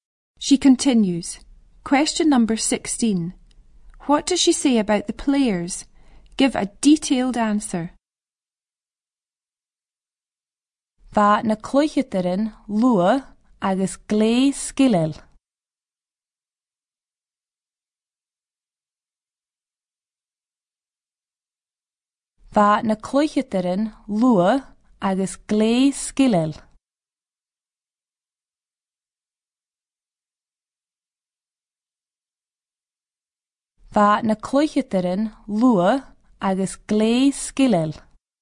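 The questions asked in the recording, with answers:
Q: What does she say about the players?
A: They were fast and very skilful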